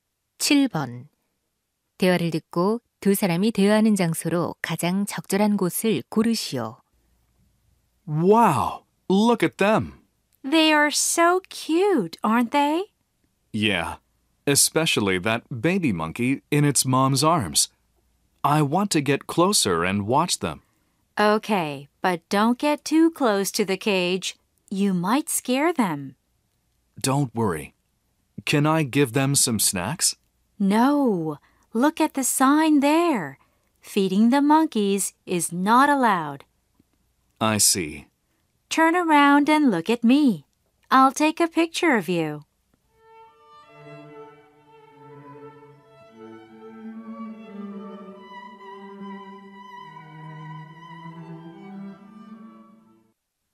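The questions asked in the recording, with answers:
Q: 대화를 듣고 두 사람이 대화하는 장소로 가장 적절한 곳을 고르시오.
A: 동물원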